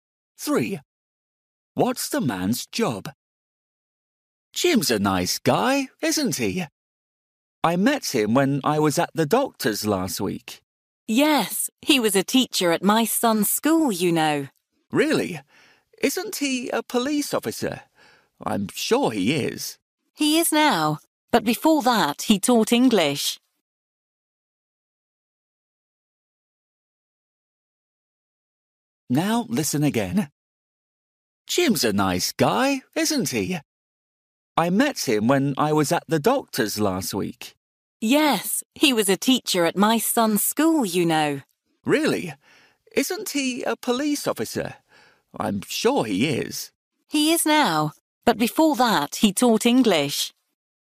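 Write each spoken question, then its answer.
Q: What's the man's job?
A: Police officer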